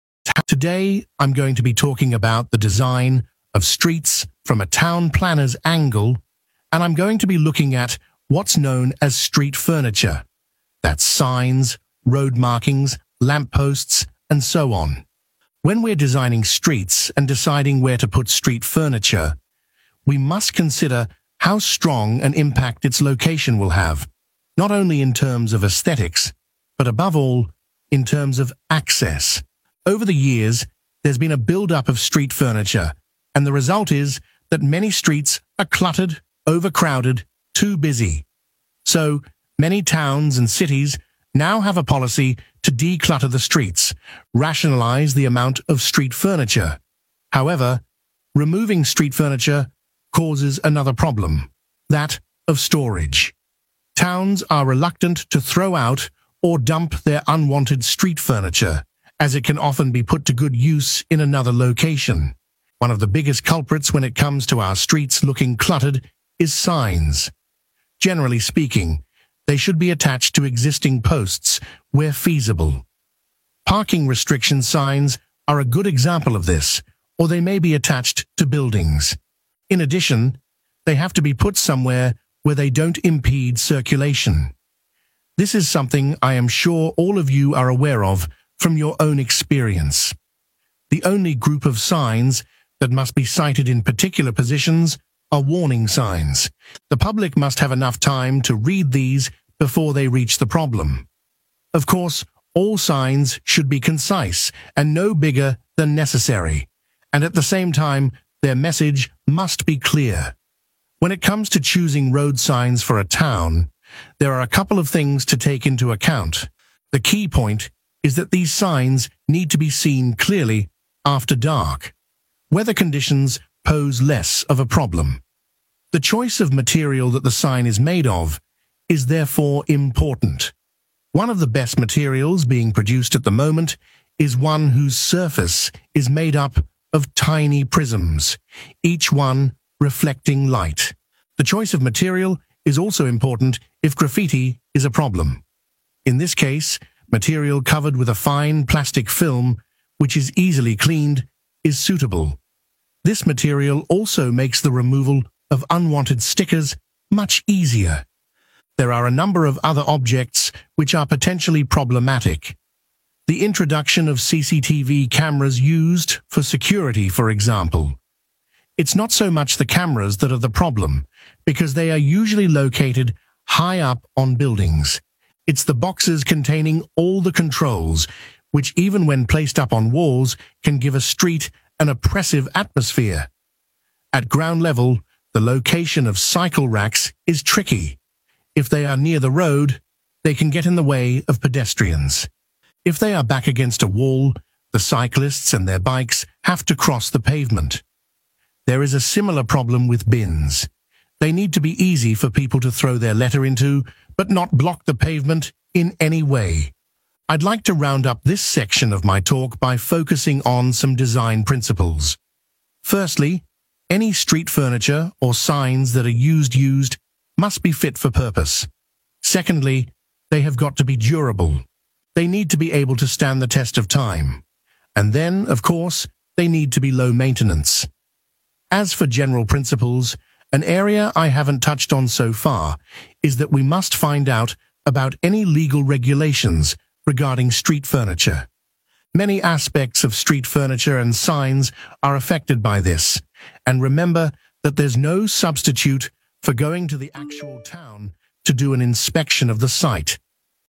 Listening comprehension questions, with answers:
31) The primary consideration in placing public amenities is their impact on 31 ____________.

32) An issue that arises from removing public amenities is 32 ____________.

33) They should not obstruct 33 ____________.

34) Specific locations are required only for signs that provide a 34 ____________.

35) It's crucial that road signs are visible in the 35 ____________.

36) Materials coated with plastic facilitate easy removal of graffiti and 36 ____________.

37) The 37 ____________ needed for CCTV systems.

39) 39 ____________.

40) Verify the 40 ____________ requirements.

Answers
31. access
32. storage
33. circulation
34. warning
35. dark
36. stickers
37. boxes
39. durable
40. legal